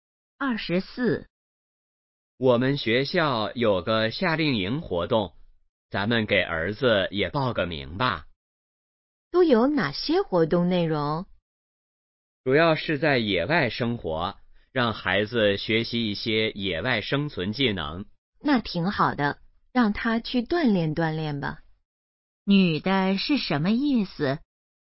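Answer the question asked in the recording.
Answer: 同意让儿子参加夏令营锻炼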